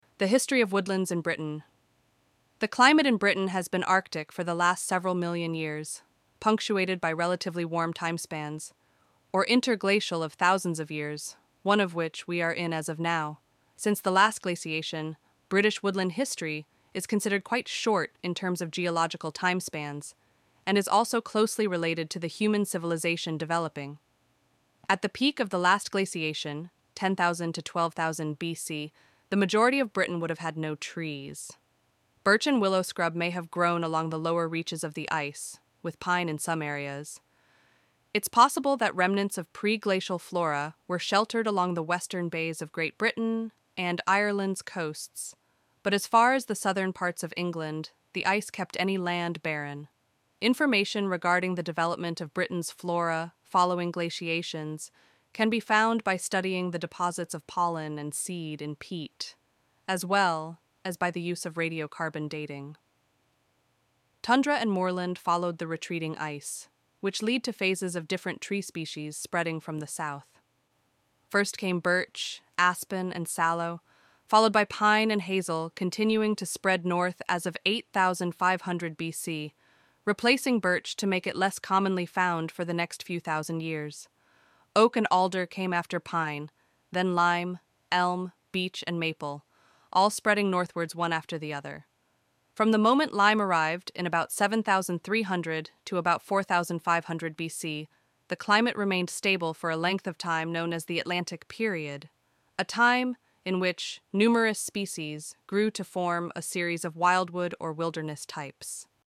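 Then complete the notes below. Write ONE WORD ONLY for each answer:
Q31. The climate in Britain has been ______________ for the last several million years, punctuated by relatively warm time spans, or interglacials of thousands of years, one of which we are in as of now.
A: Arctic

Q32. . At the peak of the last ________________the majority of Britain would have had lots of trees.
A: glaciation

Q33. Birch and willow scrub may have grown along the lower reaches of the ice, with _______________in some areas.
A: pine

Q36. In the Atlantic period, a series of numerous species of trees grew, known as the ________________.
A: wildwood

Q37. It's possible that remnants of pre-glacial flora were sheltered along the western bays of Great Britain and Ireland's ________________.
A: coasts

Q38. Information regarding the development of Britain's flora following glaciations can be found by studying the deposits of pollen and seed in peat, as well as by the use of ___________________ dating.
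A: radiocarbon

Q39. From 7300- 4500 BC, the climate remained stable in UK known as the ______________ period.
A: Atlantic

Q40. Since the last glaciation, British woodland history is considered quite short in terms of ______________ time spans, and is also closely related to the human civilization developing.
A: geological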